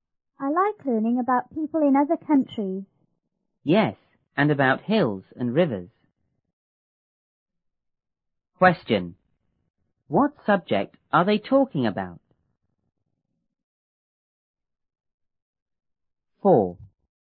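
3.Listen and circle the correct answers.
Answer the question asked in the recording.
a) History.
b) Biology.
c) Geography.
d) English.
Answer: c) Geography.

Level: 初中英语广州版1B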